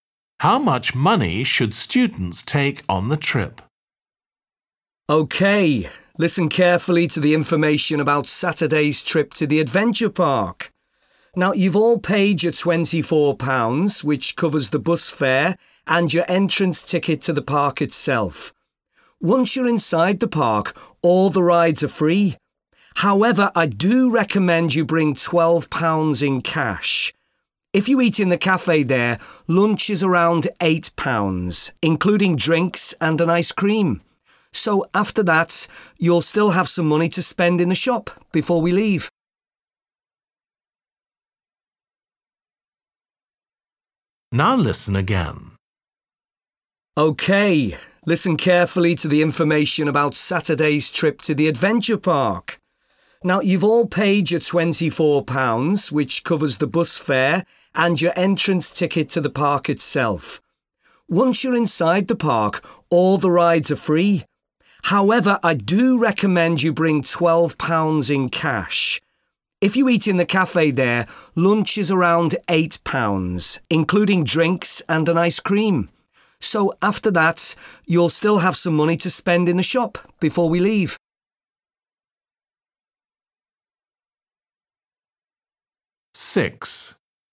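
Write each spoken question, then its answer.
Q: How much money should students take on the trip?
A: £12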